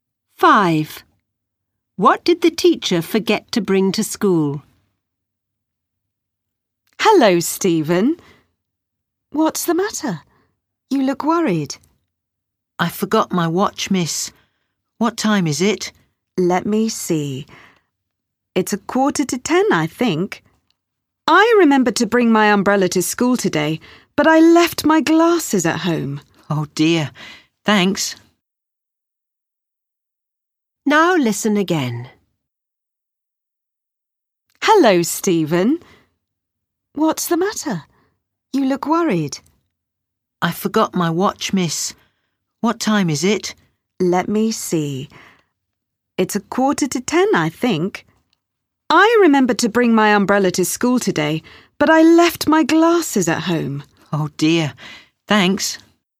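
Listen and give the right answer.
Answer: Her glasses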